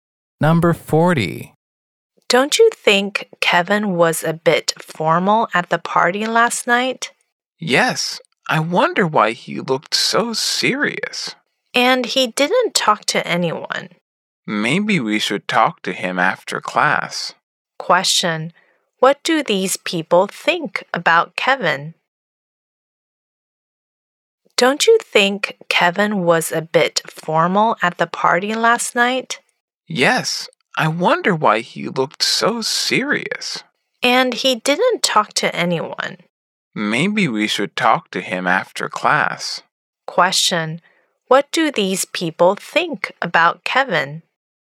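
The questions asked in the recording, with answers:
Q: What do these people think about Kevin?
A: He seemed too formal and serious at the party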